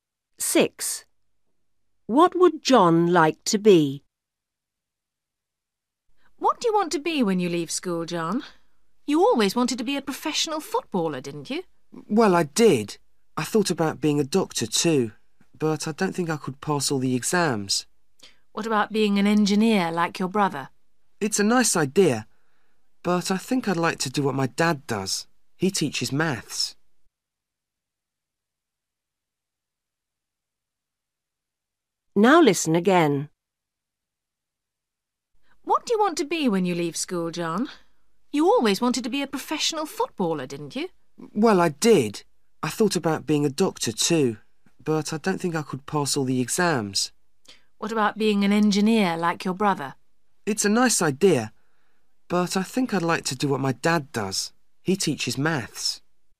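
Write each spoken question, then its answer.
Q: What would John like to be?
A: A maths teacher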